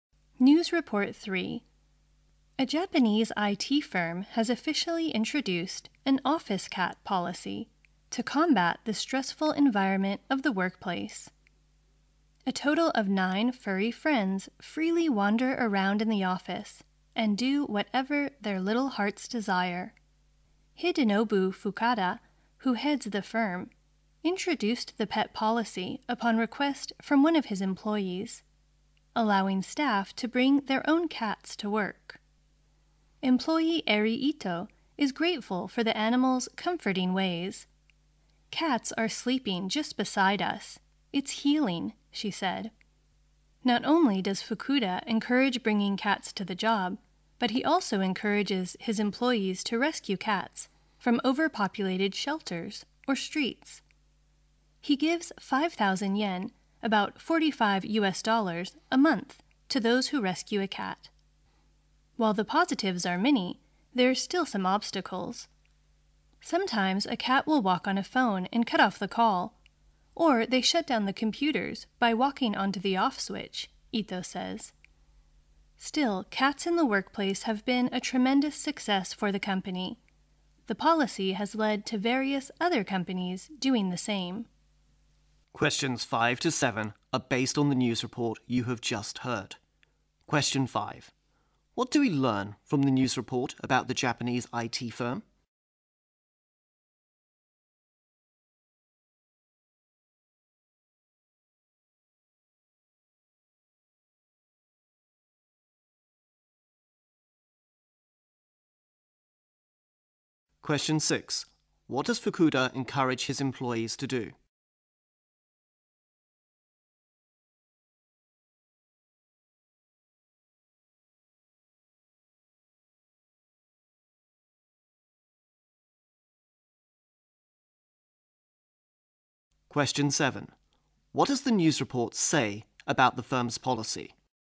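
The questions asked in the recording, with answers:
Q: What do we learn from the news report about the Japanese IT firm?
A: It introduced an office cat policy to reduce workplace stress

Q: What does Fukuda encourage his employees to do?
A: Rescue cats from shelters or streets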